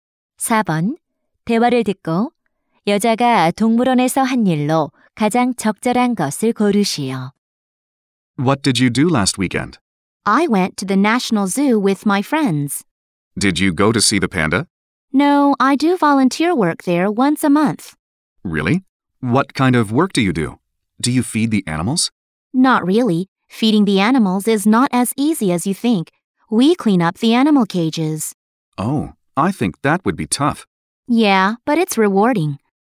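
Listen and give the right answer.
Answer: 동물 우리 청소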